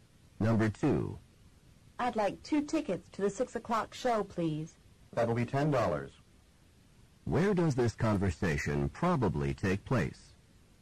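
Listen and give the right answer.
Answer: At a theater ticket office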